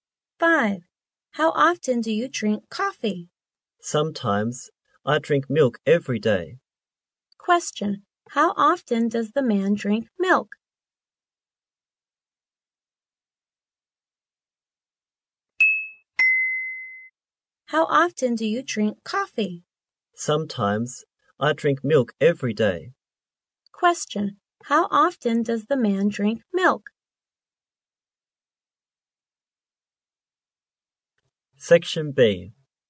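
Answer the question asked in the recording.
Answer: Every day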